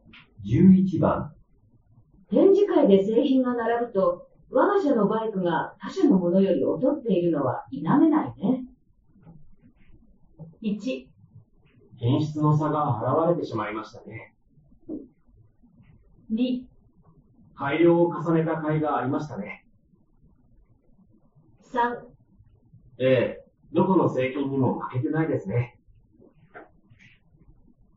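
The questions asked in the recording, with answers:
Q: 展示会で製品が並ぶと、我が社のバイクが他社のものより劣っているのは否めないね。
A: 1: 品質の差が現れてしまいましたね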